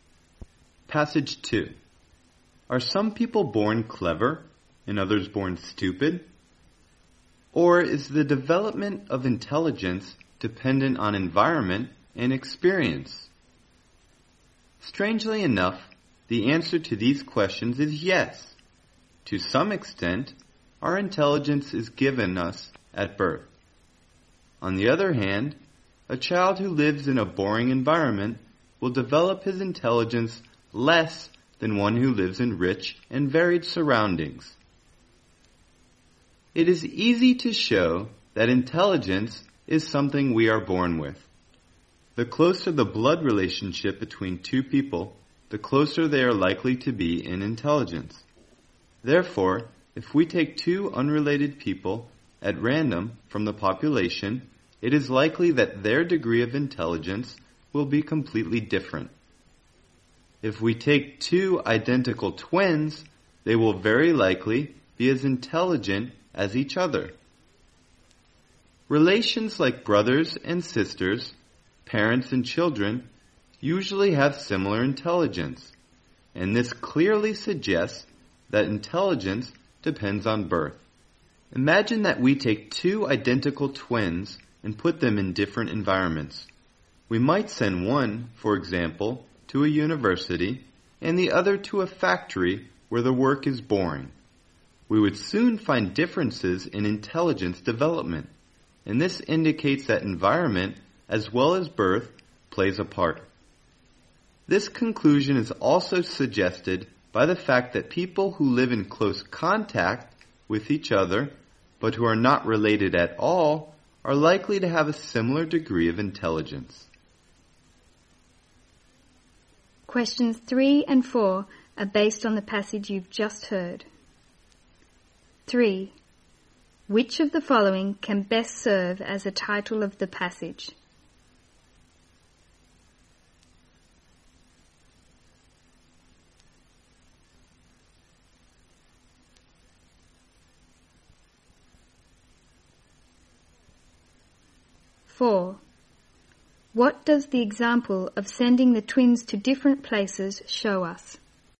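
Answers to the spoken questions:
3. Intelligence depends on both birth and environment
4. Environment also plays a part in developing intelligence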